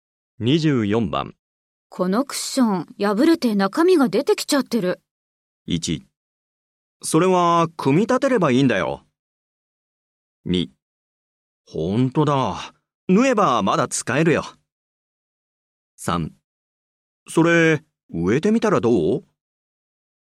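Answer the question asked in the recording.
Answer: 2: ほんとだ。縫えばまだ使えるよ。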